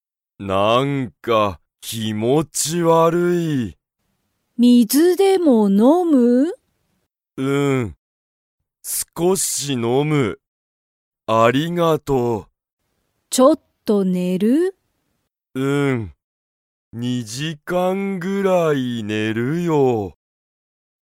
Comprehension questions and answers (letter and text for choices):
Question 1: しんは____を少(すこ)し飲(の)む。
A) 水(みず)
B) 時間(じかん)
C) ジュース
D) 気持(きも)ち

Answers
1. A) 水(みず)

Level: Level 1